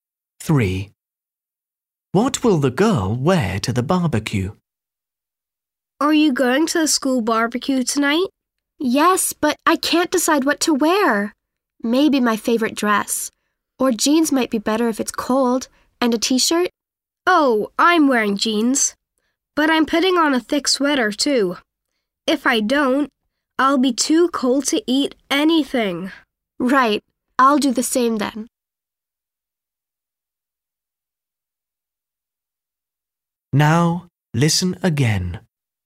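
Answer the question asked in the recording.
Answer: jeans and a thick sweater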